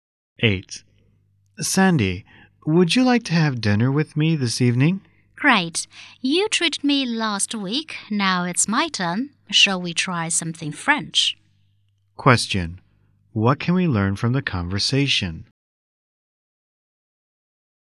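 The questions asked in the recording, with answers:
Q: What can we learn from the conversation?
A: The woman will treat the man to dinner this time.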